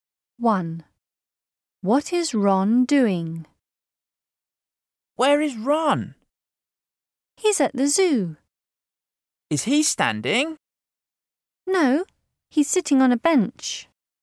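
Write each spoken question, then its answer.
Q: What is Ron doing?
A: Sitting on a bench at the zoo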